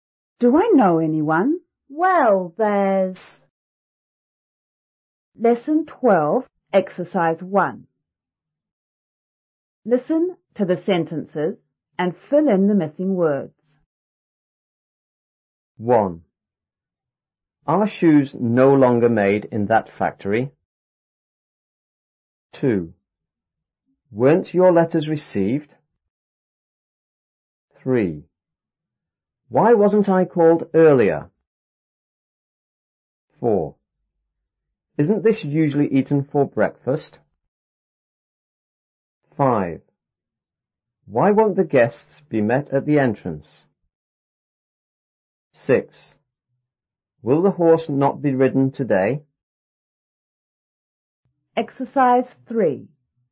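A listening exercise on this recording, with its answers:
1.Listen to the sentences and fill in the missing words.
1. _ shoes no longer _ in that factory.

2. _ your letters__.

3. Why _ I _earlier?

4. _ this usually _ for breakfast?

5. Why _ the guests _ at the entrance?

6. _the horse _ _ today?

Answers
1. Are / made
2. Weren't / received
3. wasn't / called
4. Isn't / eaten
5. won't / be met
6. Will / not / be ridden

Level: 初中英语广州版5B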